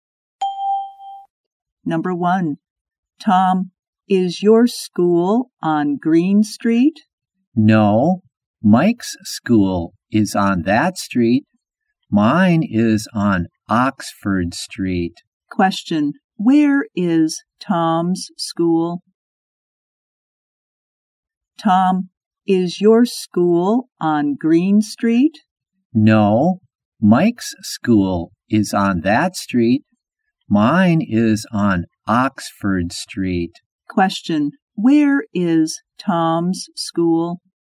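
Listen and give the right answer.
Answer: On Oxford Street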